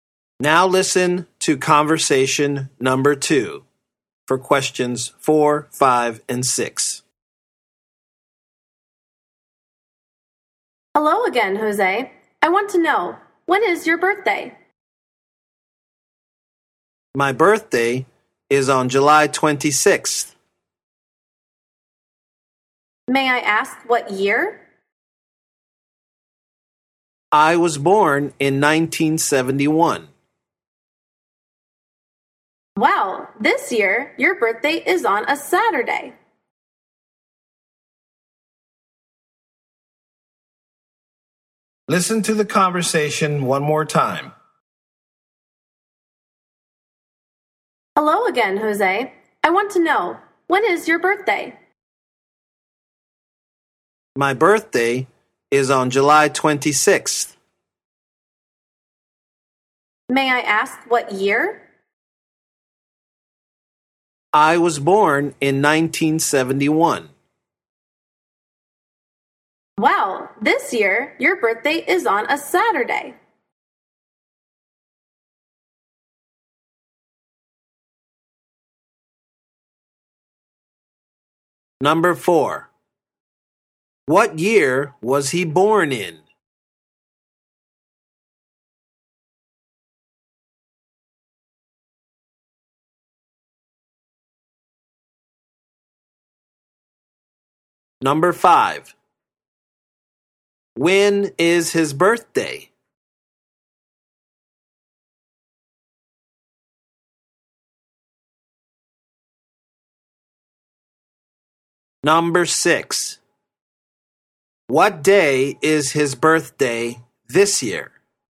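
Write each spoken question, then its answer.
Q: What year was he born in?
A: 1971

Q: When is his birthday?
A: July 26th

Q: What day is his birthday this year?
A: Saturday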